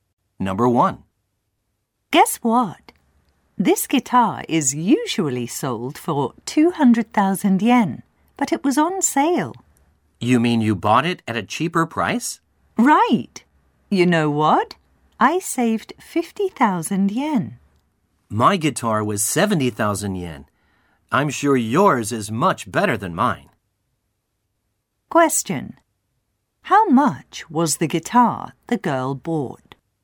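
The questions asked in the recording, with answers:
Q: How much was the guitar the girl bought?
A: 150,000 yen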